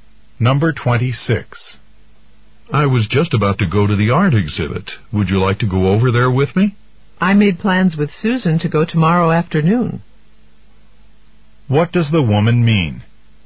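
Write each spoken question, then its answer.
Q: What does the woman mean?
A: She'll go to the exhibit tomorrow with Susan, not now.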